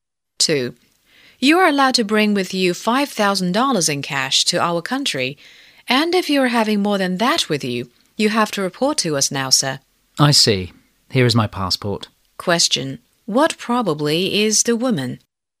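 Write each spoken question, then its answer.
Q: What probably is the woman?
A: A customs officer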